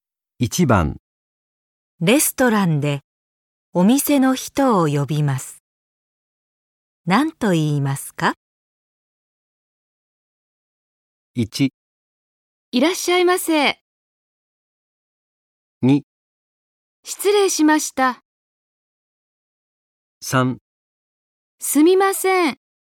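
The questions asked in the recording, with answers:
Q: レストランでお店の人を呼びます。何と言いますか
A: 3: すみません。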